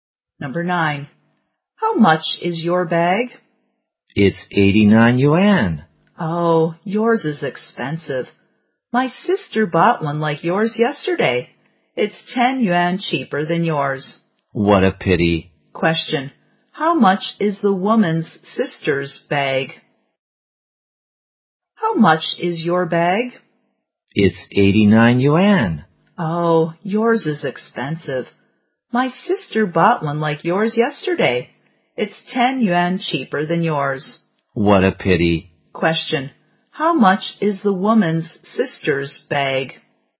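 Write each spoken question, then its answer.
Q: Question, how much is the woman's sister's bag?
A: 79 yuan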